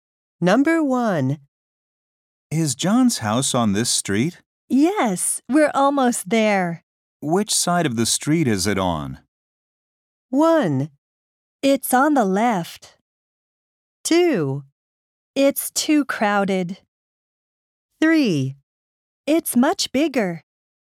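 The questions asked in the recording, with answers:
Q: Which side of the street is it on?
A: 1: It's on the left.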